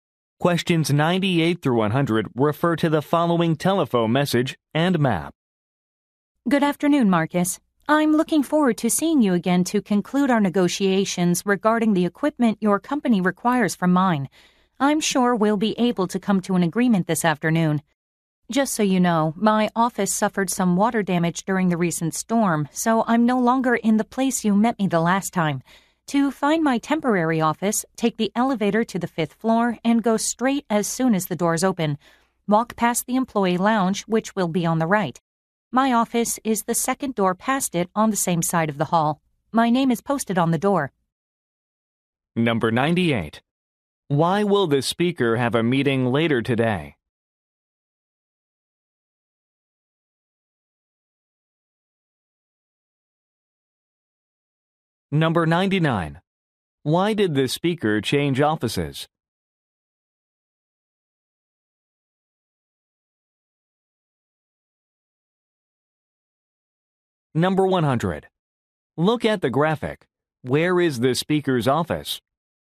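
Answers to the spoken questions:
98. To conclude negotiations about equipment
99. His office had water damage from a storm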